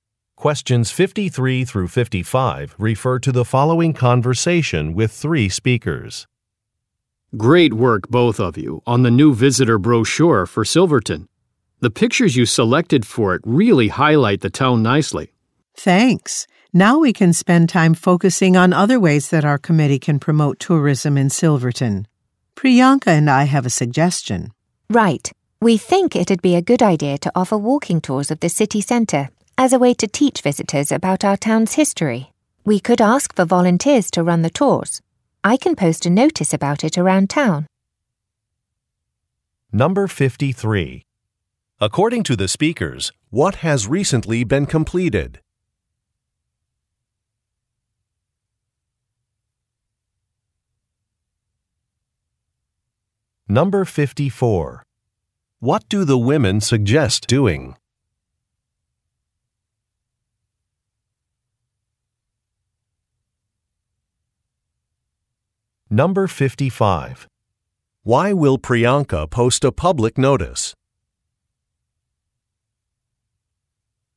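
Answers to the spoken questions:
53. A new visitor brochure for Silverton
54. Offering walking tours of the city centre
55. To find volunteers to run the tours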